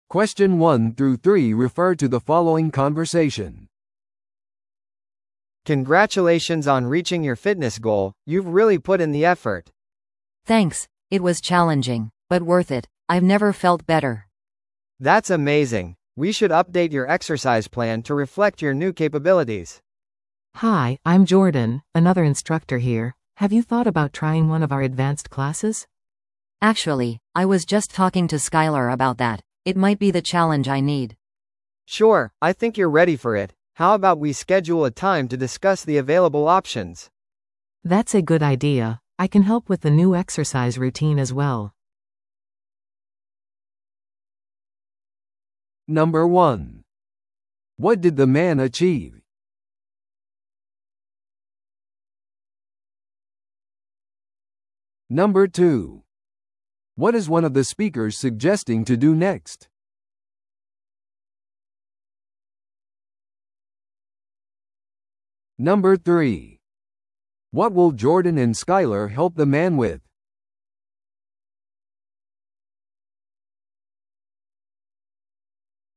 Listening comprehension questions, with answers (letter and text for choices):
Listen to the audio below and answer the questions.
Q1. What did the man achieve?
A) スポーツ大会で優勝した。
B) マラソンを完走した。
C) フィットネスの目標に到達した。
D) フィットネスのインストラクターになった。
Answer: C) フィットネスの目標に到達した。

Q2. What is one of the speakers suggesting to do next?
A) 運動から休憩を取る。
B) 運動計画を更新する。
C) 参加者をもっと募る。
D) フィットネスセミナーを開催する。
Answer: B) 運動計画を更新する。

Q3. What will Jordan and Skyler help the man with?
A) 適切なダイエットを選ぶこと。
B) 新しいワークアウト用品を探すこと。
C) ジムのメンバーシップの設定をすること。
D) 新しいエクササイズルーティンを作成すること。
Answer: D) 新しいエクササイズルーティンを作成すること。

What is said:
A: Congratulations on reaching your fitness goal, you've really put in the effort.
B: Thanks! It was challenging, but worth it. I've never felt better.
A: That's amazing. We should update your exercise plan to reflect your new capabilities.
C: Hi, I'm Jordan, another instructor here. Have you thought about trying one of our advanced classes?
B: Actually, I was just talking to Skyler about that. It might be the challenge I need.
A: Sure, I think you're ready for it. How about we schedule a time to discuss the available options?
C: That's a good idea. I can help with the new exercise routine as well.